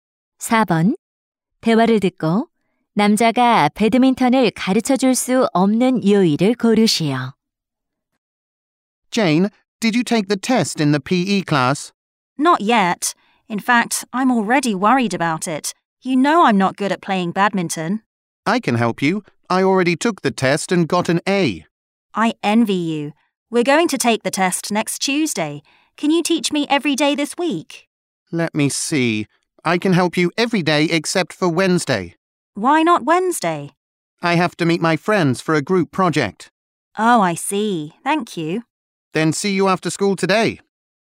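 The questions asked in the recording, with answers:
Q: 대화를 듣고 남자가 배드민턴을 가르쳐 줄 수 없는 요일을 고르시오.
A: 수요일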